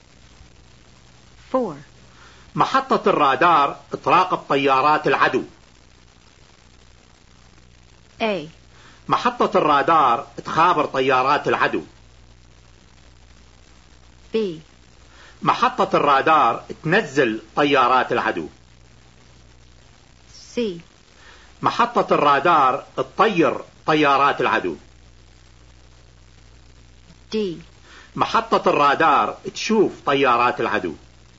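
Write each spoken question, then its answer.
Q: محطة الرادار تراقب طيارات العدو.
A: D: محطة الرادار تشوف طيارات العدو.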